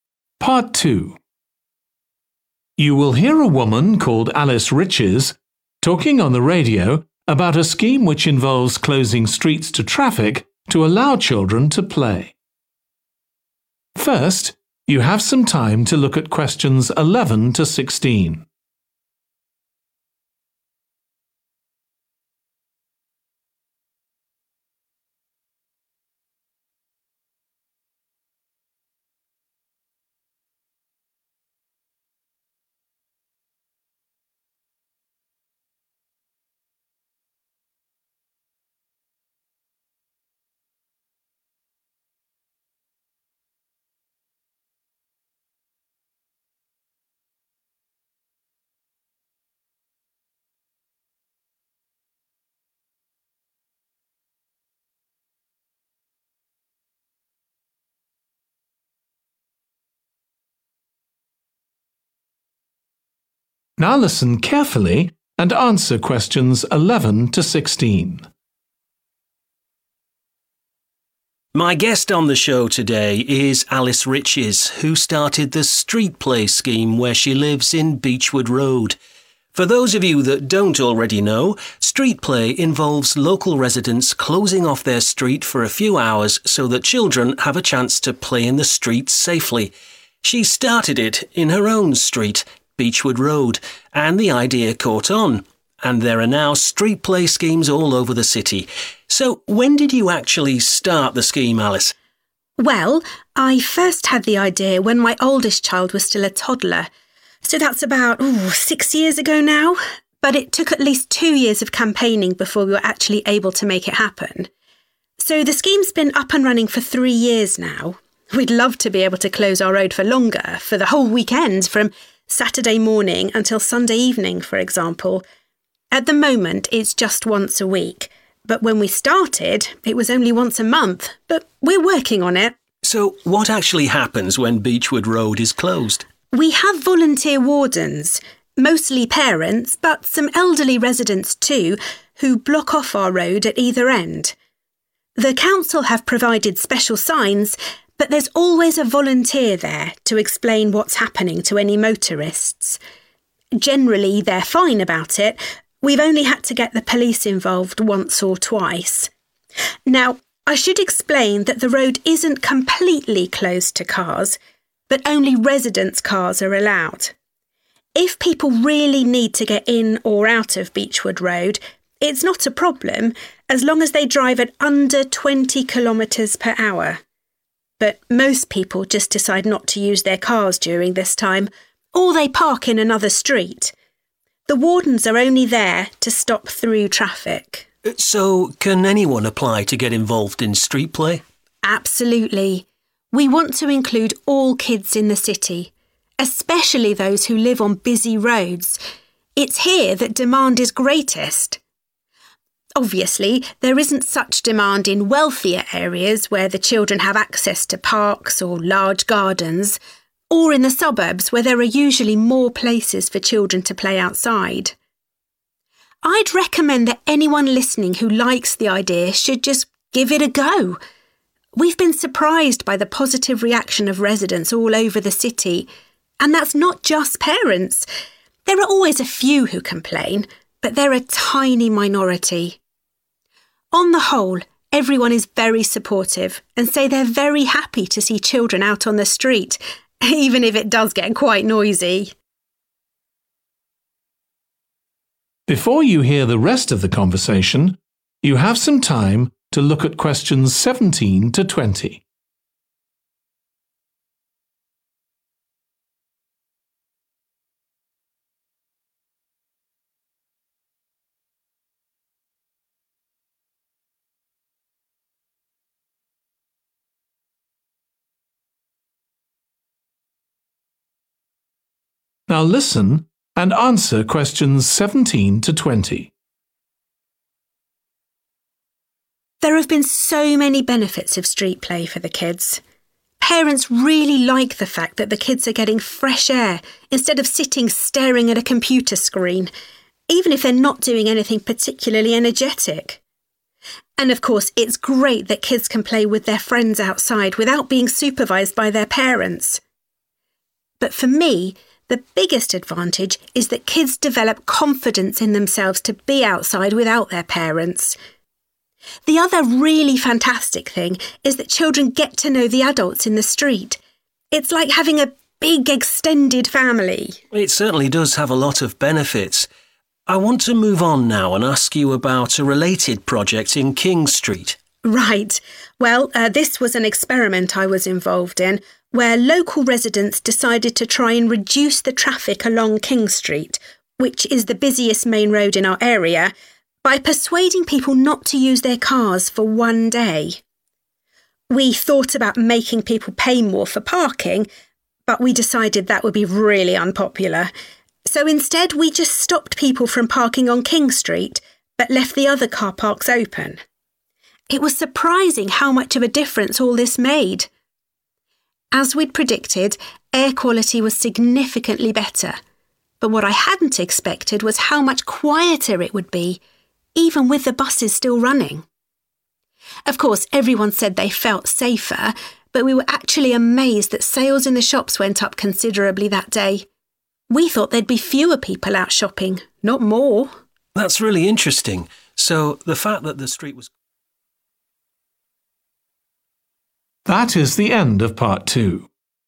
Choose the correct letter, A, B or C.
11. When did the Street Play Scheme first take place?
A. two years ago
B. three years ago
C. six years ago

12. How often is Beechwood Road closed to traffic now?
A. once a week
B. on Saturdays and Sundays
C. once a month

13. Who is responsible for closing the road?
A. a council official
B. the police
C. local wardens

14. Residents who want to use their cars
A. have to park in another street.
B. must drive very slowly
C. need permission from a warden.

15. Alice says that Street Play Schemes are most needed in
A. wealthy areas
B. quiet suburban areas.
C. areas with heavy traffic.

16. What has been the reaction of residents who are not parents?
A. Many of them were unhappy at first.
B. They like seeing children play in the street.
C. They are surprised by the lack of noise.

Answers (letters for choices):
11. B
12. A
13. C
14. B
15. C
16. B